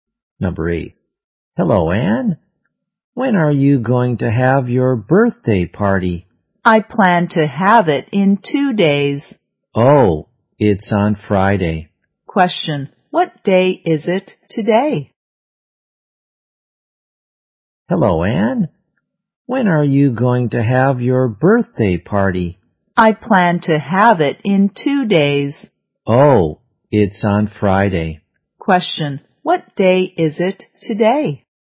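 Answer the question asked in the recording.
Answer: Wednesday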